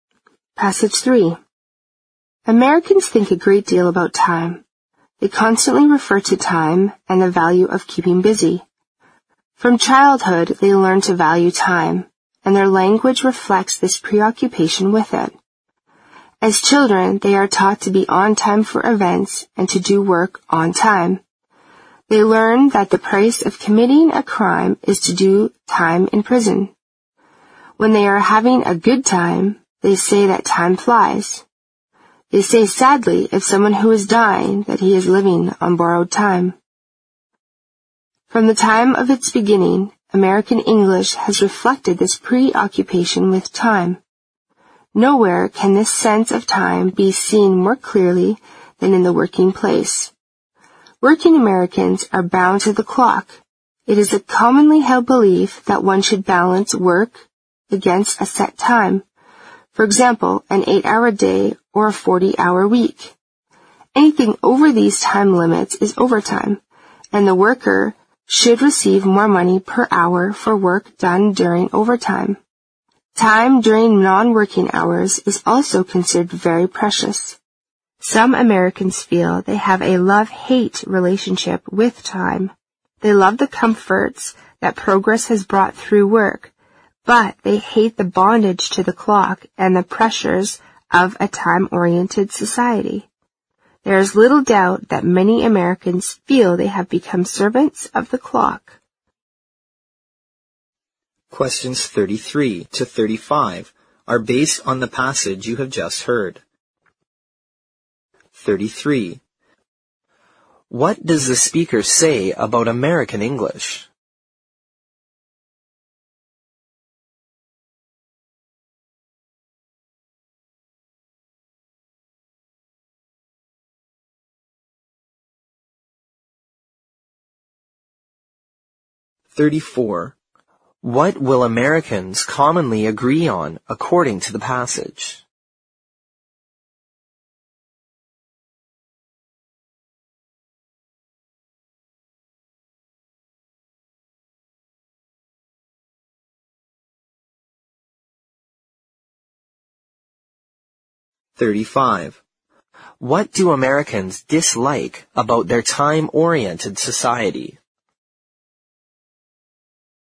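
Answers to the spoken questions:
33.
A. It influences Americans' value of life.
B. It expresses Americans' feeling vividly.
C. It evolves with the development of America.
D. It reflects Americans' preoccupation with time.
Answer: D. It reflects Americans' preoccupation with time.
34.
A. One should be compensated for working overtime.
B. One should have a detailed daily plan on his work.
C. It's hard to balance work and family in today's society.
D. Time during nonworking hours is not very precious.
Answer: A. One should be compensated for working overtime.
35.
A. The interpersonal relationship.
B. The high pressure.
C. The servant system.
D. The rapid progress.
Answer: B. The high pressure.

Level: 四级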